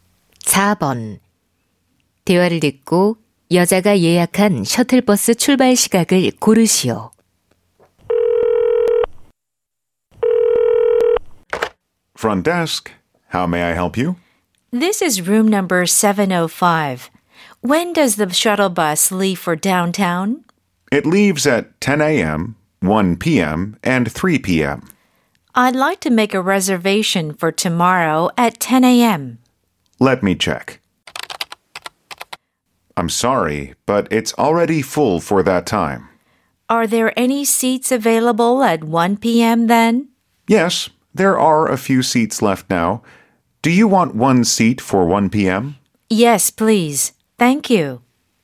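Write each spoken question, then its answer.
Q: 대화를 듣고 여자가 예약한 셔틀버스 출발 시각을 고르시오.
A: 오후 1시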